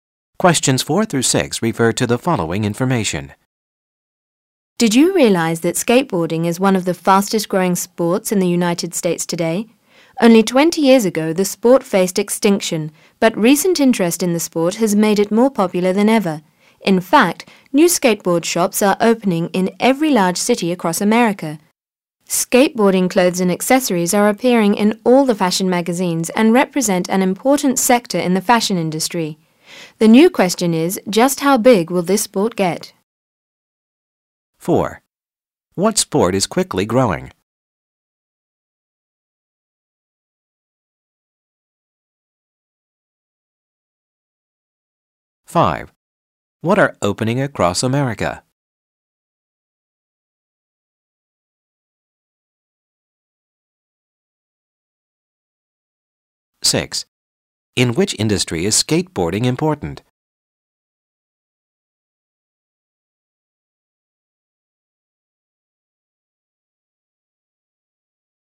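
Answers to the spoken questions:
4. Skateboarding
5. New skateboard shops
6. The fashion industry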